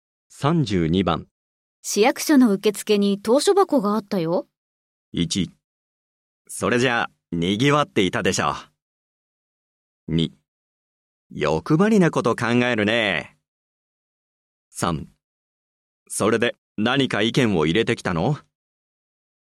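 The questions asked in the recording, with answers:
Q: 市役所の受付に投書箱があったよ。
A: 3: それで何か意見を入れてきたの?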